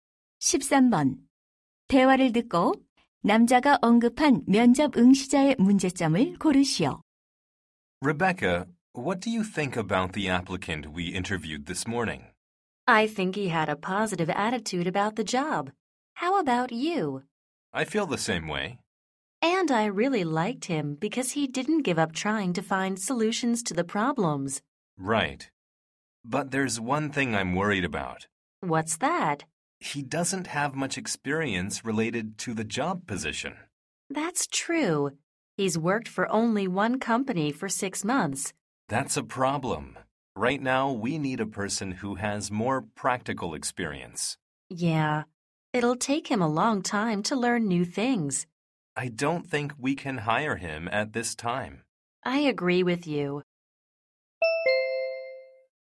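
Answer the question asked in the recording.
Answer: 관련 경력이 부족하다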